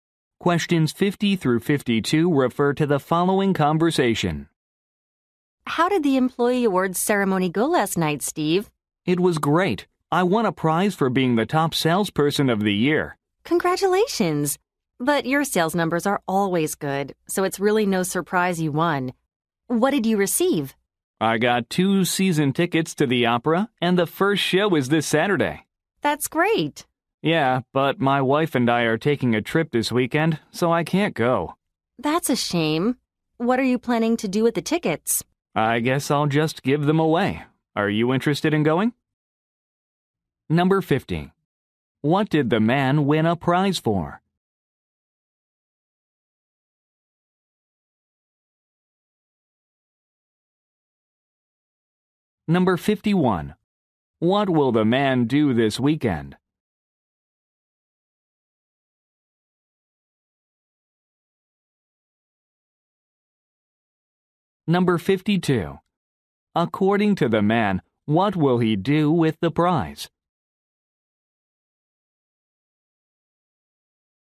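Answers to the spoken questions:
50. Being the top salesperson of the year
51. Take a trip with his wife
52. Give the tickets away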